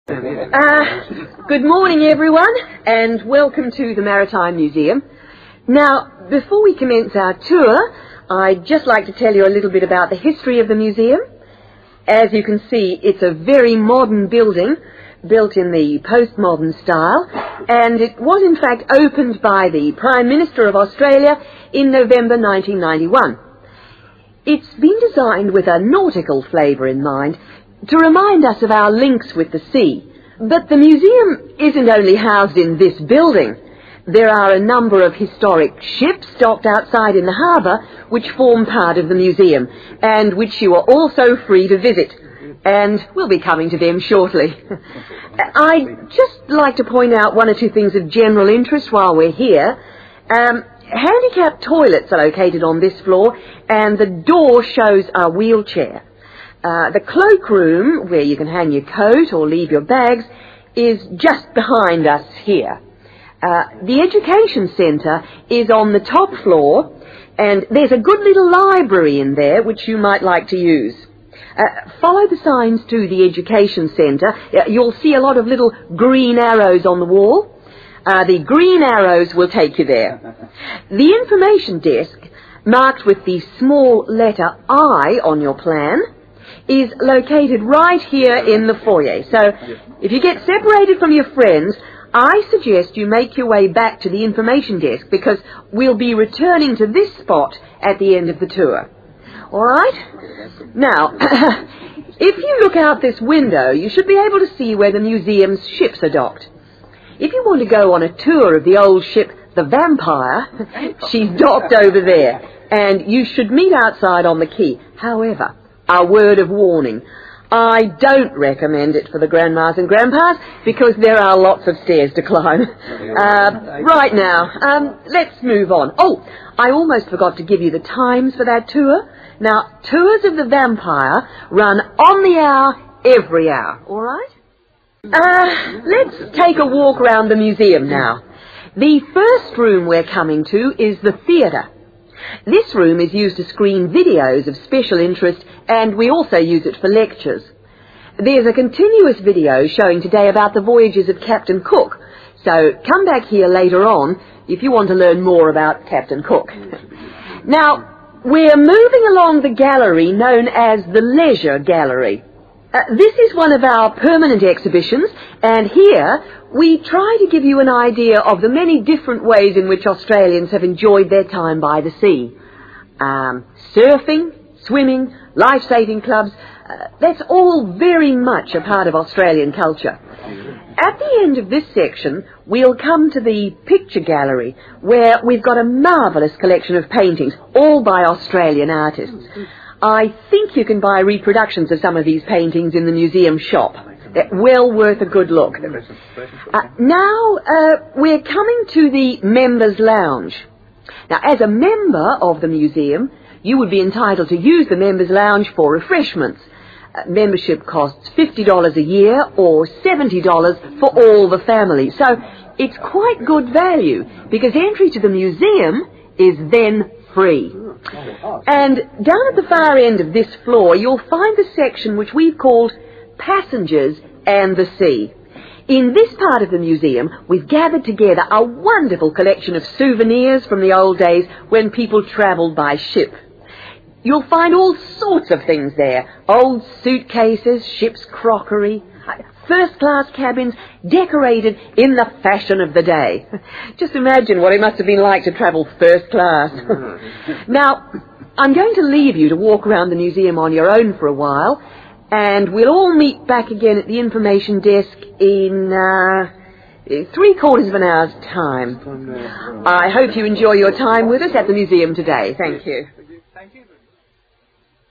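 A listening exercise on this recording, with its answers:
Complete the notes below using NO MORE THAN THREE WORDS for each answer.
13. Date the museum was opened (13) ................................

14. The museum consists of a building and (14) ..................................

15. The Education Centre is signposted by (15) ..............................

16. If you lose your friends, meet at the (16) ....................................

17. Warning about The Vampire (17) .............................................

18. How often are the tours of The Vampire? (18) ..............................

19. Person featured in today's video (19) .........................................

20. The Leisure Gallery shows how Australian culture is influenced by (20) ....................................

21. The Picture Gallery contains pictures by (21) .......................................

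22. Cost of family membership of the museum (22) ........................................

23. "Passengers and the Sea" includes a collection of (23) ......................................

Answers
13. November 1991
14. historic ships
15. green arrows
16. information desk
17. lots of stairs
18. every hour
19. Captain Cook
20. the sea
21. Australian artists
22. $70 a year
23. souvenirs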